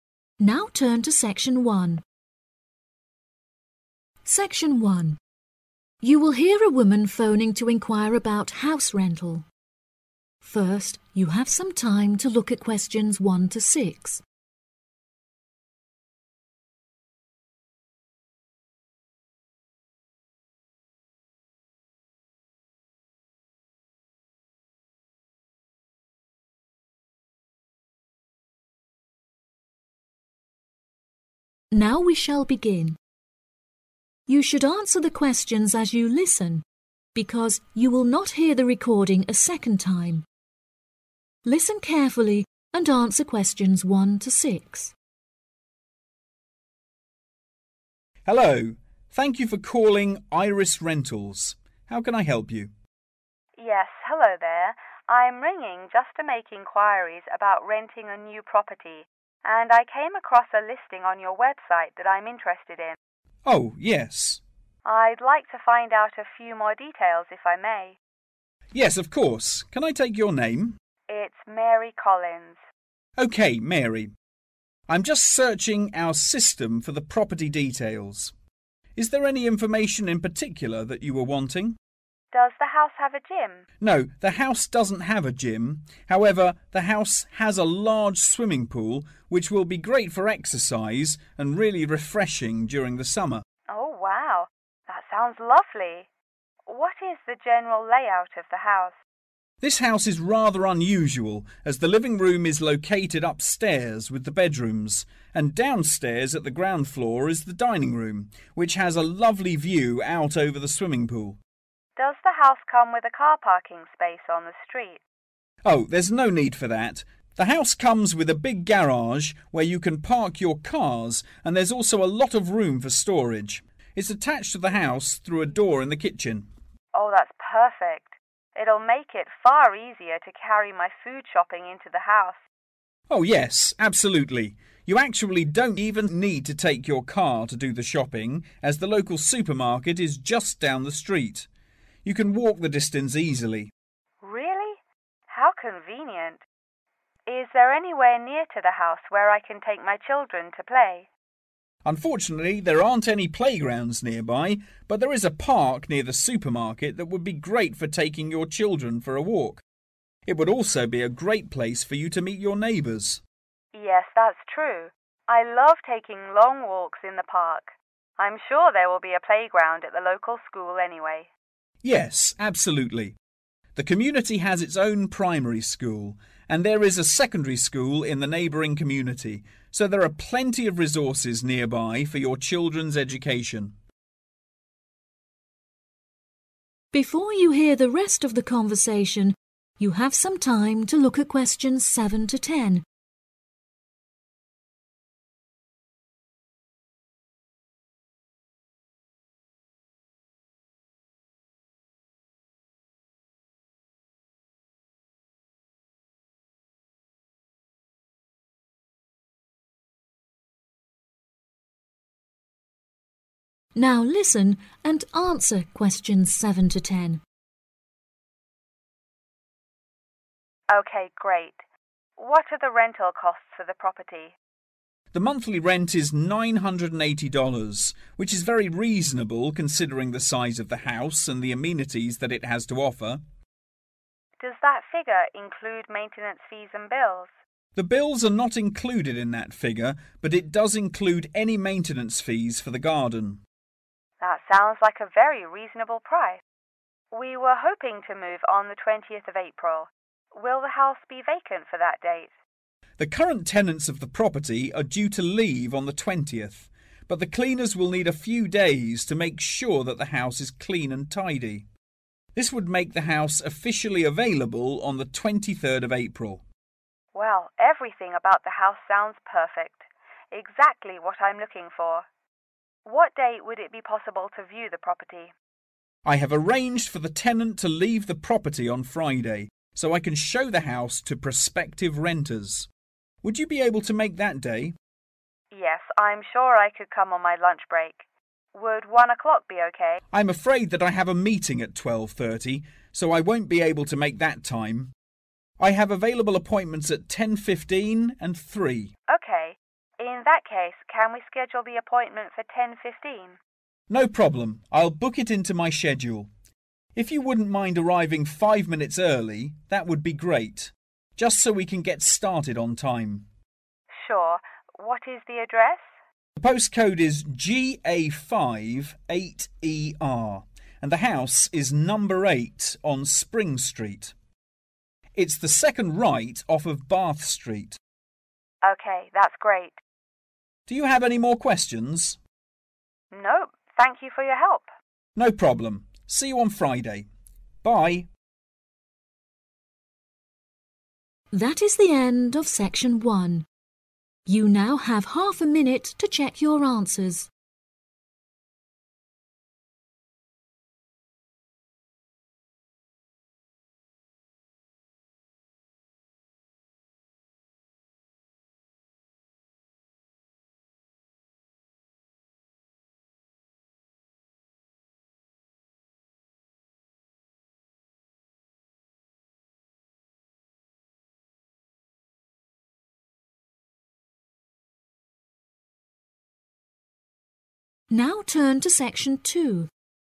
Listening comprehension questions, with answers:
Complete the information below. Write NO MORE THAN TWO WORDS AND/ OR A NUMBER.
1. Facility available: (1)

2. Downstairs: (2)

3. Car park: availability of a large (3)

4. Shopping: at the (4)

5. Place for children playing: (5)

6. Education resources: a (6) in the community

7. (including the maintenance fees of the (7) )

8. Date of house available: (8)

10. Address: 8 (10)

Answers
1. swimming pool
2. dining room
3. garage
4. local supermarket
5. park
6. primary school
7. garden
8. 23 April
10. spring street